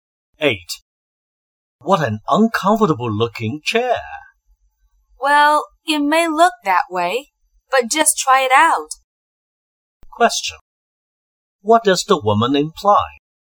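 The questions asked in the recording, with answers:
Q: What does the woman imply?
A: The chair is more comfortable than it looks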